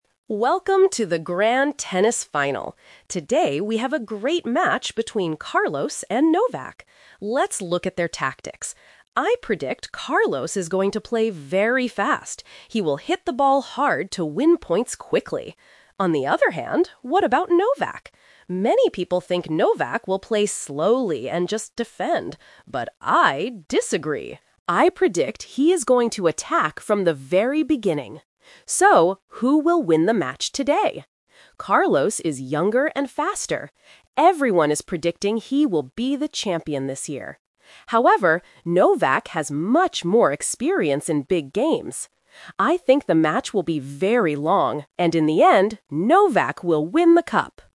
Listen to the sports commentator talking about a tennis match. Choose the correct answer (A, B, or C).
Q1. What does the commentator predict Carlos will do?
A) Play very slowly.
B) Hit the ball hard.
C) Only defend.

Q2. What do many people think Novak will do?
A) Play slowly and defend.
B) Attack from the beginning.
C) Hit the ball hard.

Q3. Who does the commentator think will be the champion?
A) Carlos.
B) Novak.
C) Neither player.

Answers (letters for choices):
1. B
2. A
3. B

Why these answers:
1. The commentator says, "I predict Carlos is going to play very fast. He will hit the ball hard..."
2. The commentator clearly states, "Many people think Novak will play slowly and just defend."
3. At the end of the audio, the commentator predicts: "...in the end, Novak will win the cup!"

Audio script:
Welcome to the Grand Tennis Final! Today, we have a great match between Carlos and Novak. Let's look at their tactics. I predict Carlos is going to play very fast. He will hit the ball hard to win points quickly.
On the other hand, what about Novak? Many people think Novak will play slowly and just defend. But I disagree! I predict he is going to attack from the very beginning.
So, who will win the match today? Carlos is younger and faster. Everyone is predicting he will be the champion this year. However, Novak has much more experience in big games. I think the match will be very long, and in the end, Novak will win the cup!